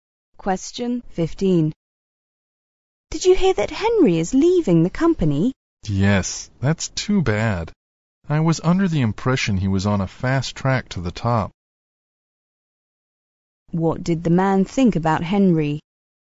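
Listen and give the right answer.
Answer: He thought Henry would be promoted quickly to the top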